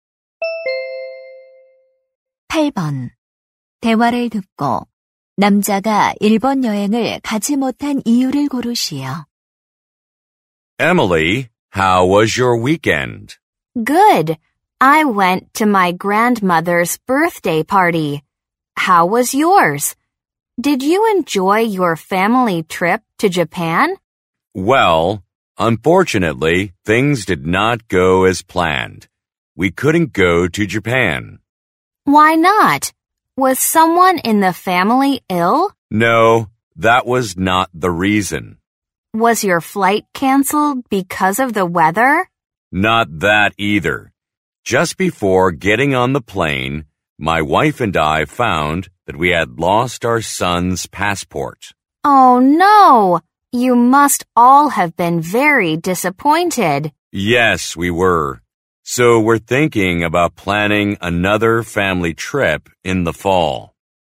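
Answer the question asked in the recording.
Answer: 아들의 여권을 잃어버려서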